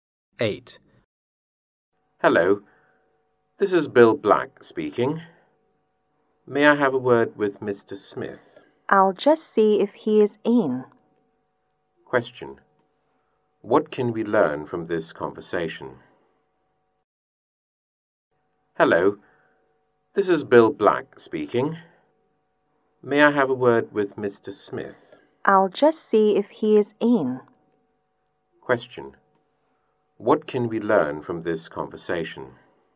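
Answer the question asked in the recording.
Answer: Bill Black wants to speak to Mr. Smith, who may not be in.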